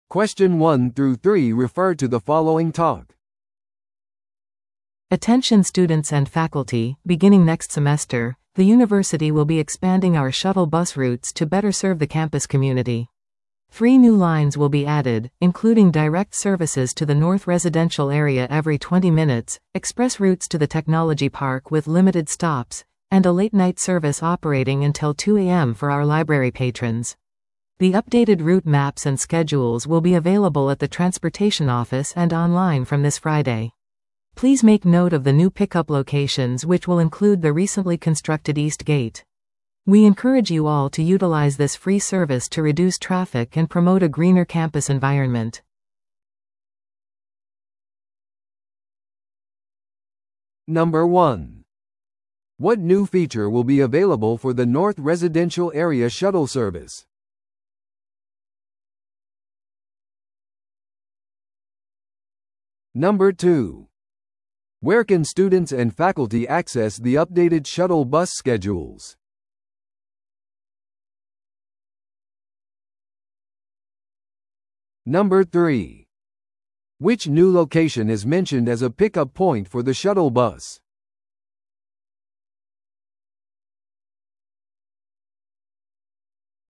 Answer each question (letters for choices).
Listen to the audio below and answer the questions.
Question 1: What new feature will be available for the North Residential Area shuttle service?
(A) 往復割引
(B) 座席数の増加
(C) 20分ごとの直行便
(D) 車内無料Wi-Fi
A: C

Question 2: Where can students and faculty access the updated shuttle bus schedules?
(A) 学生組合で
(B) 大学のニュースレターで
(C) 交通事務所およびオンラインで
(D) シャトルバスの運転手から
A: C

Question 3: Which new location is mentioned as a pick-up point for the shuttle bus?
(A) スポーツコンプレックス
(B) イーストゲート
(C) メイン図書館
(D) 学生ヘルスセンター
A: B

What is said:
Attention students and faculty, beginning next semester, the university will be expanding our shuttle bus routes to better serve the campus community. Three new lines will be added, including direct services to the North Residential Area every 20 minutes, express routes to the Technology Park with limited stops, and a late-night service operating until 2am for our library patrons. The updated route maps and schedules will be available at the transportation office and online from this Friday. Please make note of the new pick-up locations which will include the recently constructed East Gate. We encourage you all to utilize this free service to reduce traffic and promote a greener campus environment.